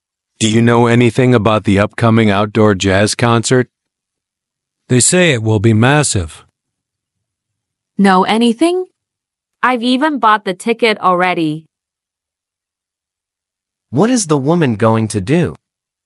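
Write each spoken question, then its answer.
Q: What is the woman going to do?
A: Go to the outdoor jazz concert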